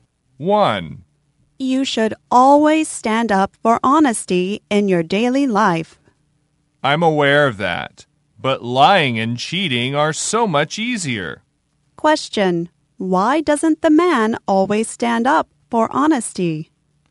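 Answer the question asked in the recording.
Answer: Because lying and cheating are so much easier.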